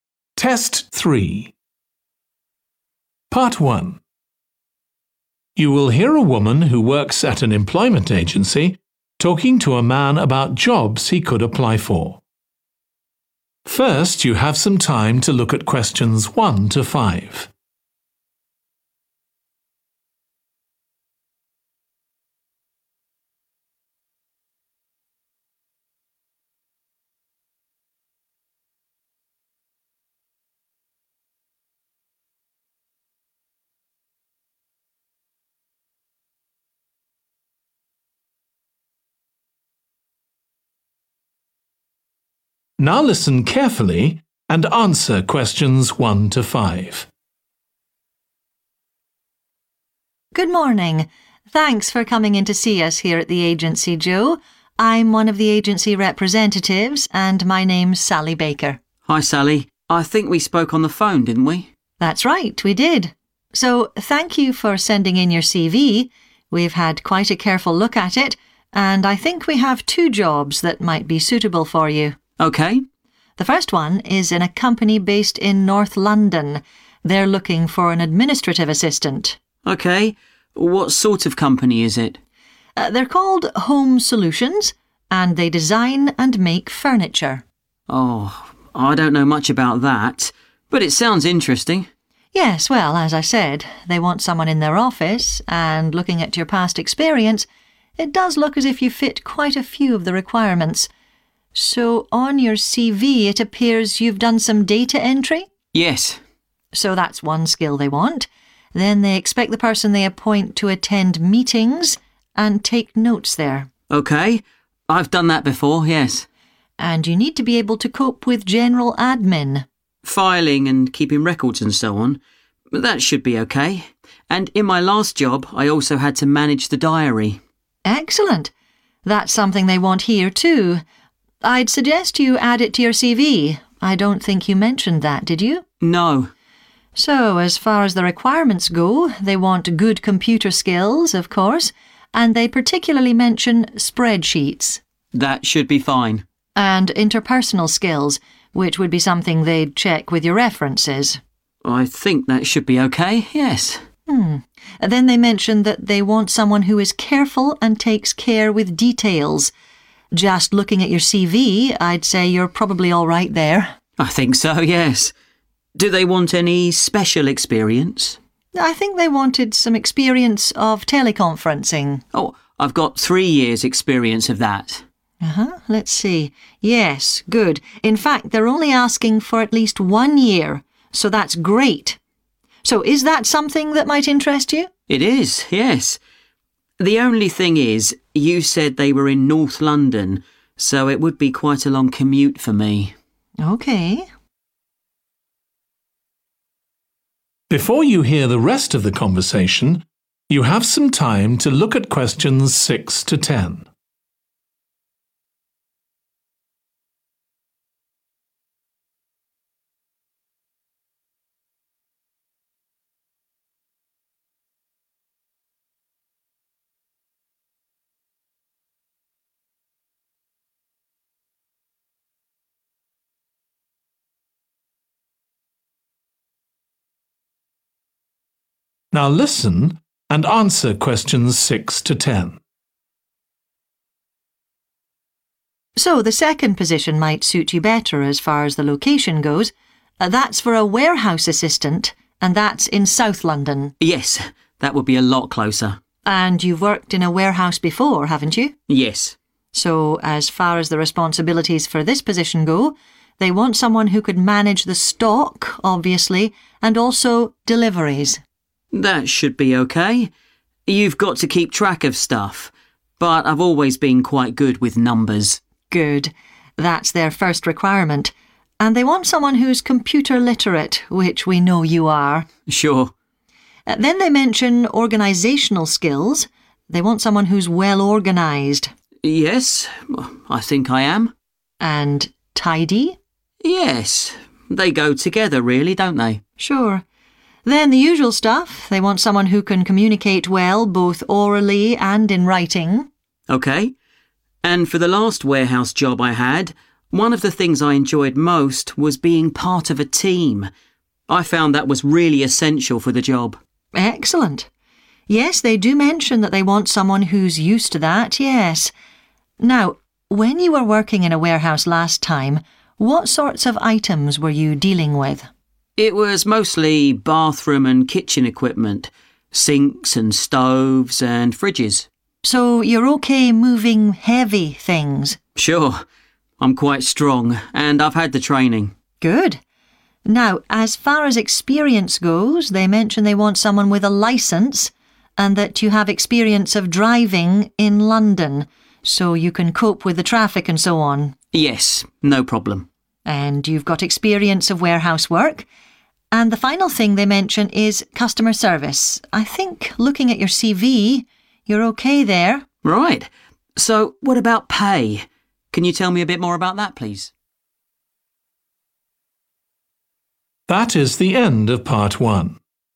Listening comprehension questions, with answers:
Complete the notes below. Write ONE WORD AND/OR A NUMBER for each answer.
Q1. Administrative assistant in a company that produces 1. (North London)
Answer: furniture

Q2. go to 2. and take notes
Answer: meetings

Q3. management of 3.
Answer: diary

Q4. attention to 4.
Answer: detail(s)

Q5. need a minimum of 5. of experience of teleconferencing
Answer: 1 / one year

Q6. managing 6.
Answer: deliveries

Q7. very organised and 7.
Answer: tidy

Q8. used to working in a 8.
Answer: team

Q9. able to cope with items that are 9.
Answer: heavy

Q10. 10. service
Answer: customer